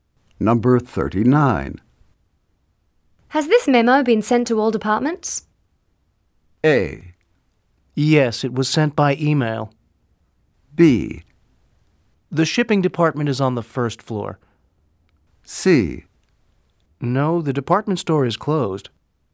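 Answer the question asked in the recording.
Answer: A: Yes, it was sent by email.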